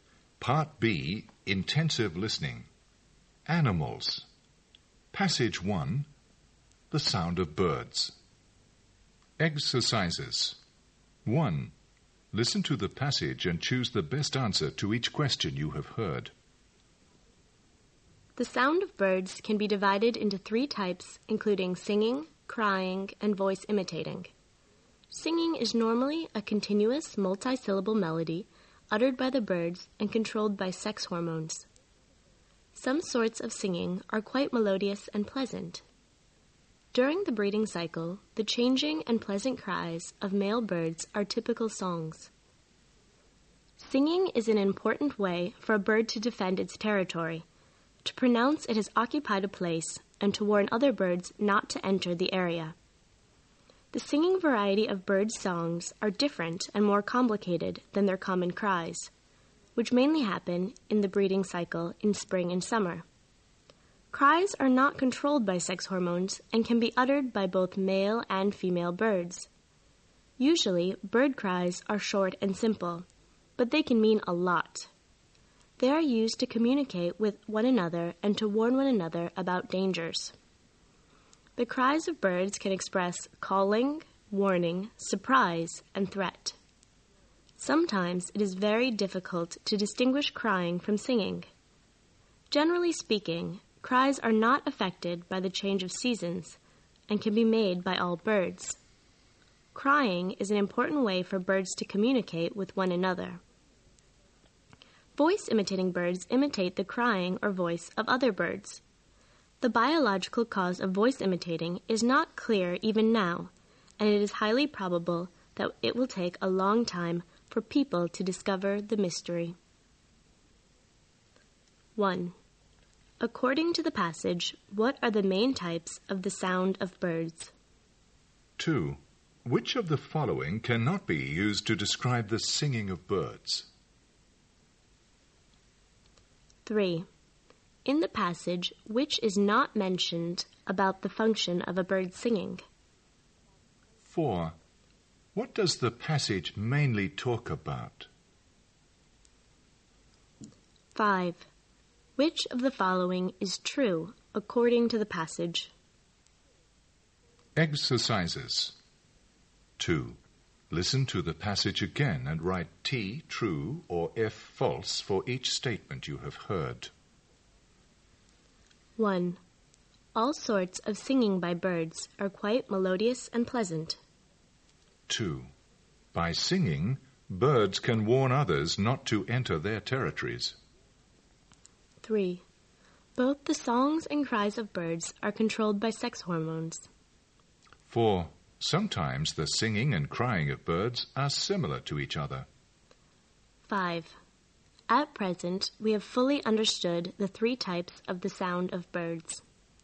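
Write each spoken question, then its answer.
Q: According to the passage, what are the main types of the sound of birds?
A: Singing, crying and voice imitating

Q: What does the passage mainly talk about?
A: The sound of birds (its three types)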